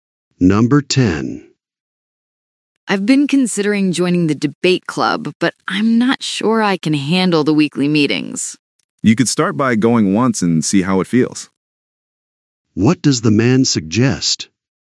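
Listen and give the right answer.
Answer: Attending one meeting to see how it feels.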